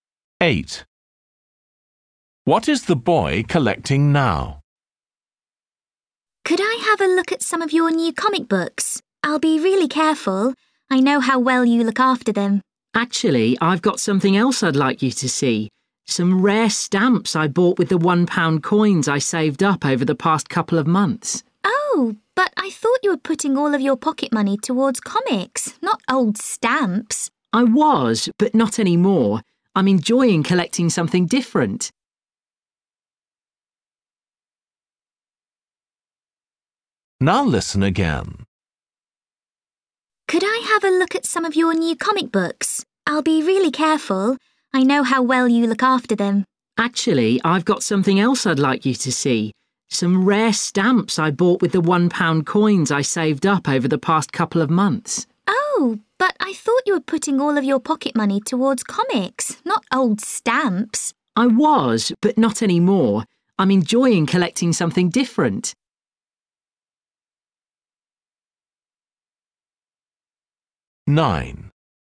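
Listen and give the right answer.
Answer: rare stamps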